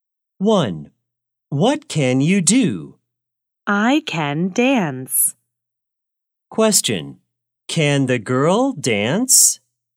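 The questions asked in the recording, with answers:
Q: Can the girl dance?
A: Yes, she can.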